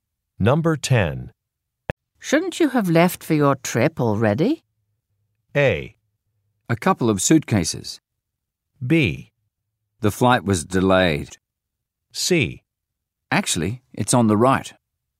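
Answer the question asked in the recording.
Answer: B: The flight was delayed.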